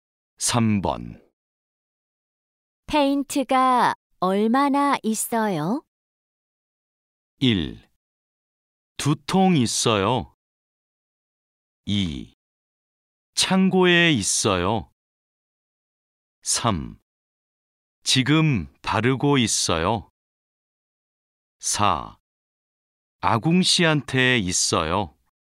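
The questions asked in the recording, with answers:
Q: 페인트가 얼마나 있어요?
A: 1: 두 통 있어요.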